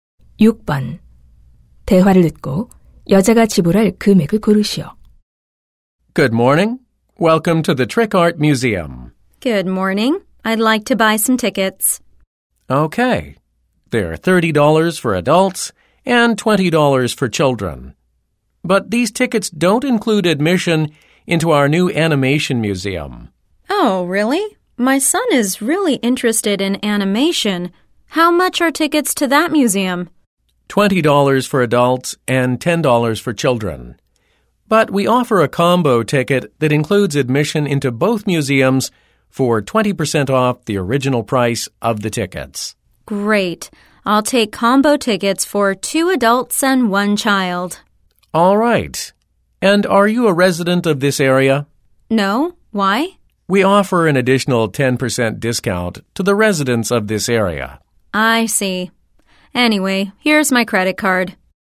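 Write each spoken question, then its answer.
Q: 대화를 듣고 여자가 지불할 금액을 고르시오.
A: $104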